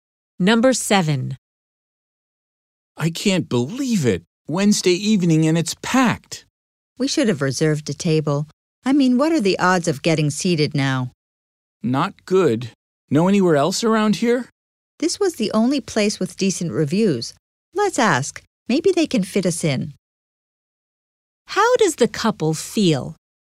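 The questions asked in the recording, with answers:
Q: How does the couple feel?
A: Frustrated; they doubt they will get a table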